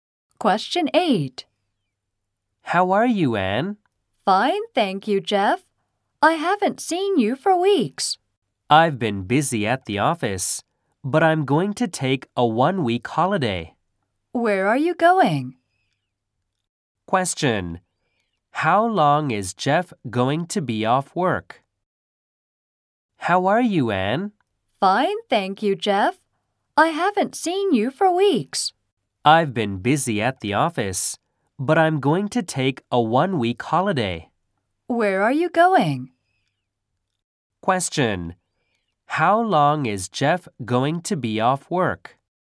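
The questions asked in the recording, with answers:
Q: How long is Jeff going to be off work?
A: One week.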